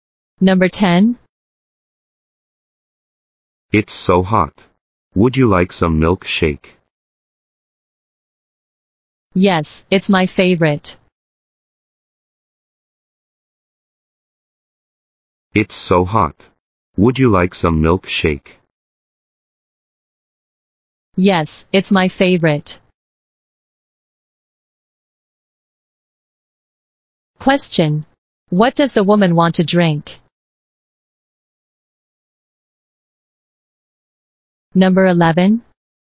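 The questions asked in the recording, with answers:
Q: What does the woman want to drink?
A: Milkshake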